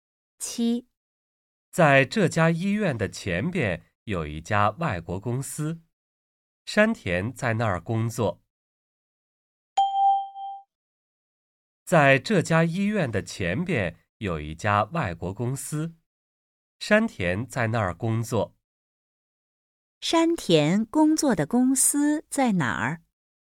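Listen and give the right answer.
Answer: 在这家医院的前边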